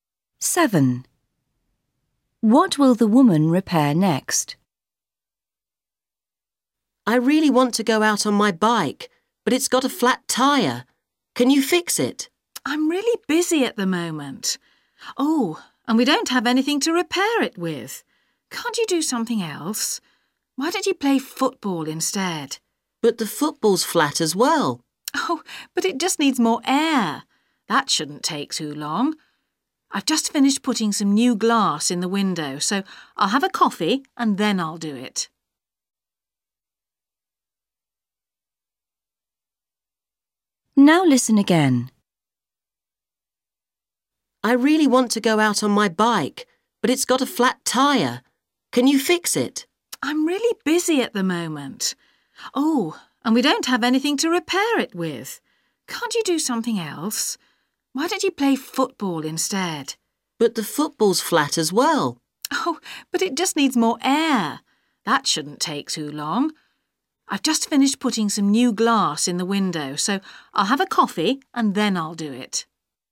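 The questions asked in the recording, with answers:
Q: What will the woman repair next?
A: The football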